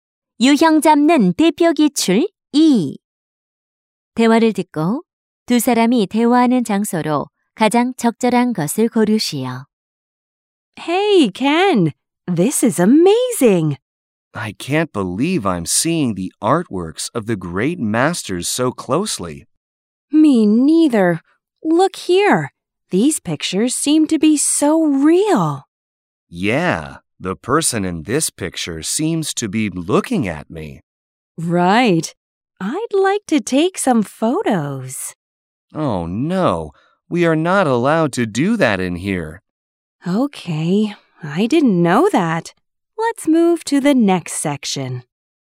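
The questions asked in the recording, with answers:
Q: 대화를 듣고 두 사람이 대화하는 장소로 가장 적절한 것을 고르시오.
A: 미술관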